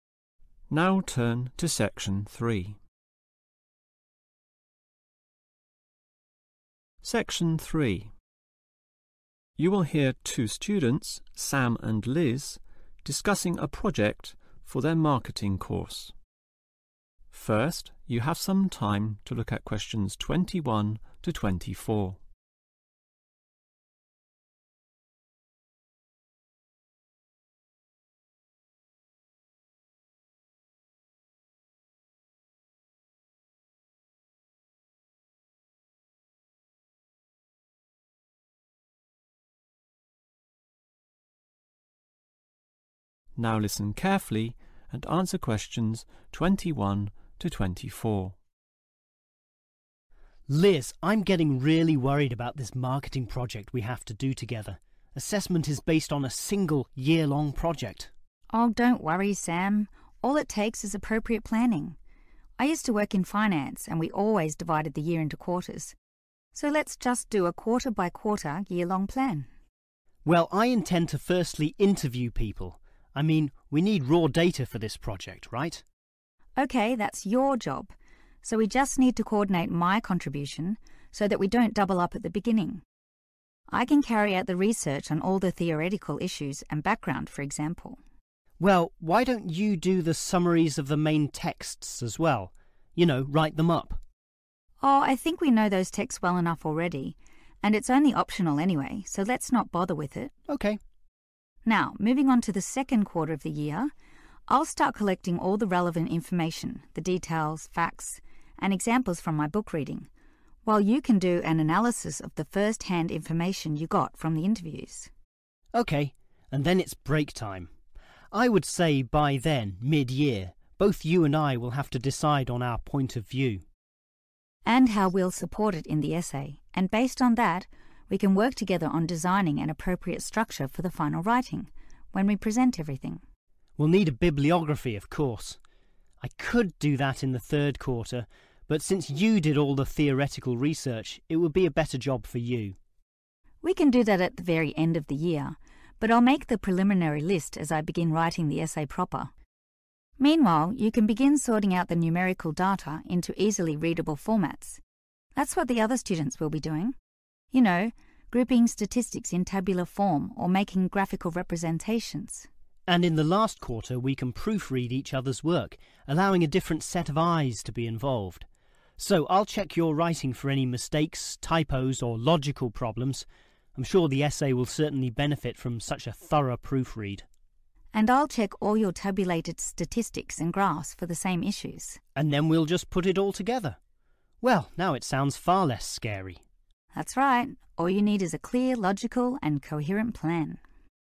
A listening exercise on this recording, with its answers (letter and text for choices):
Complete the plan below. Write the correct letter from the list A-H next to questions 21-24.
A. read other student's writing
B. proofread the essay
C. write text summaries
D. check the table of contents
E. produce graphs and tables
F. do theoretical research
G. compile the bibliography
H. analyse data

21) Liz (21) ..........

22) (22) .........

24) (24) .........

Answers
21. F. do theoretical research
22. H. analyse data
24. B. proofread the essay